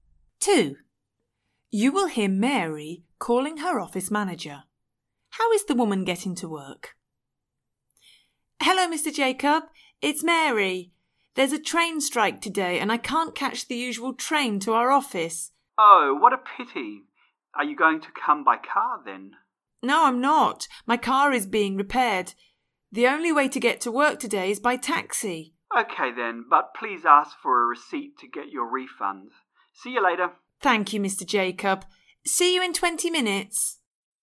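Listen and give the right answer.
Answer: By taxi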